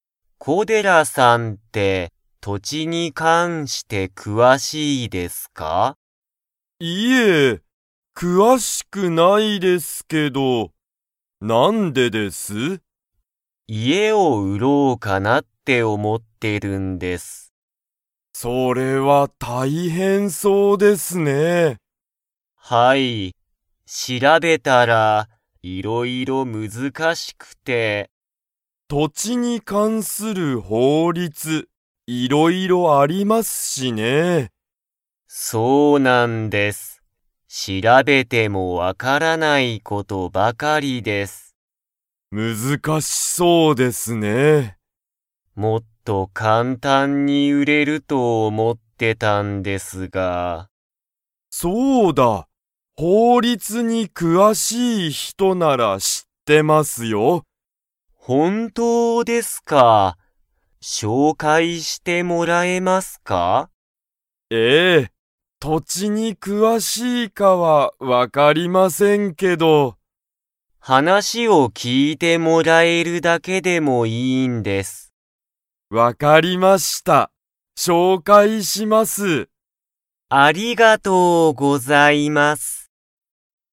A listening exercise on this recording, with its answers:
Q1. 今井いまいさんは、何なにを売うろうと思おもっていますか?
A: 家いえ

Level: Level 3